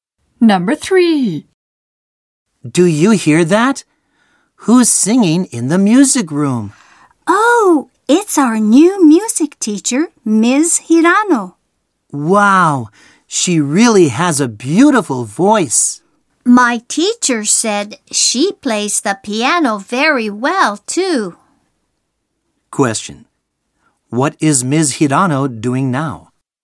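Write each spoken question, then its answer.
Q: What is Ms. Hirano doing now?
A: Singing in the music room.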